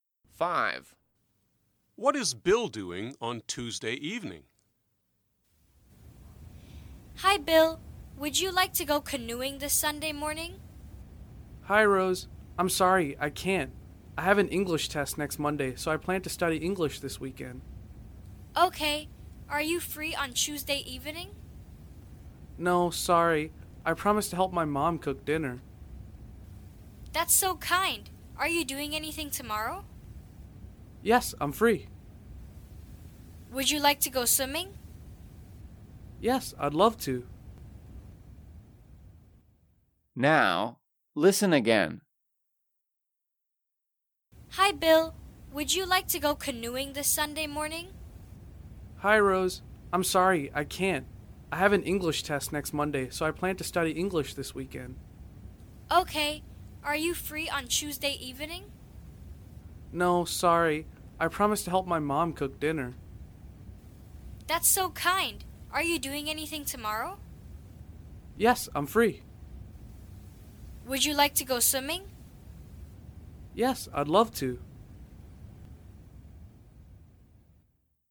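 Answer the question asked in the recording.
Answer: helping his mom cook dinner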